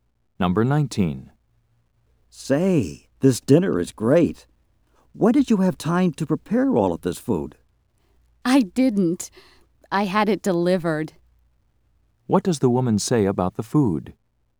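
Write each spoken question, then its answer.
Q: What does the woman say about the food?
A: She had it delivered; she didn't cook it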